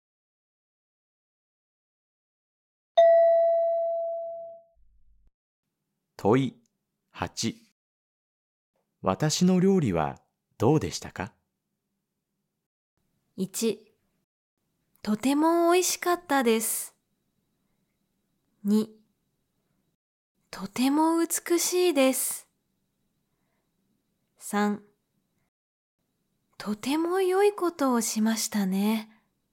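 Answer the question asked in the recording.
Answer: 1: とても美味しかったです。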